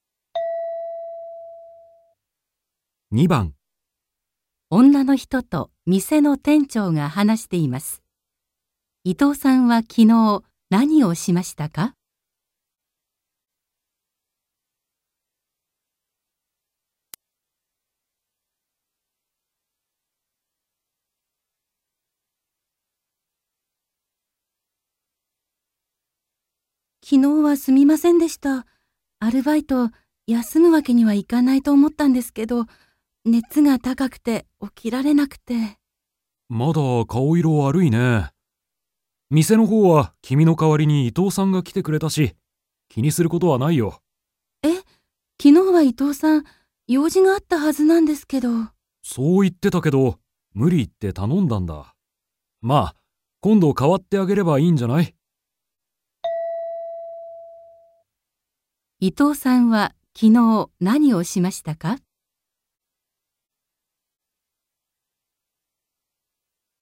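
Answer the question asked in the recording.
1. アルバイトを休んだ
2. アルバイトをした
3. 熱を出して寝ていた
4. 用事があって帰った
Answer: 2. アルバイトをした

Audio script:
F: 昨日はすみませんでした。アルバイト、休むわけにはいかないと思ったんですけど、熱が高くて、起きられなくて...
M: また、顔色悪いね。店のほうは君の代わりに伊藤さんが来てくれたし、気にすることはないよ。
F: え? 昨日は伊藤さん、用事があったはずなんですけど。
M: そう言ってたけど、無理言って頼んだんだ。まあ、今度代わってあげればいいんじゃない?
伊藤さんは昨日何をしましたか。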